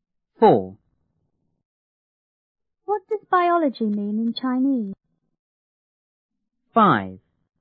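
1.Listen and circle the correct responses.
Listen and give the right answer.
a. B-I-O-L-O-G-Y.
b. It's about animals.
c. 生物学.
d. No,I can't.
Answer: c. 生物学.

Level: 初中英语广州版1B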